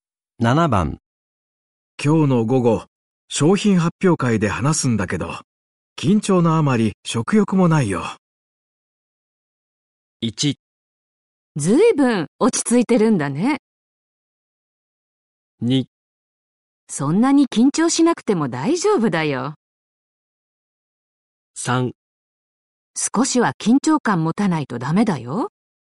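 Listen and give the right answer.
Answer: 2: そんなに緊張しなくても大丈夫だよ。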